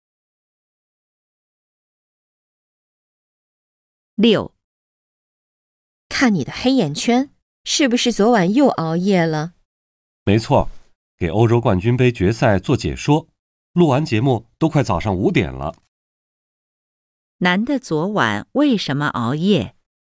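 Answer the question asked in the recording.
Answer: 给欧洲冠军杯决赛做解说、录节目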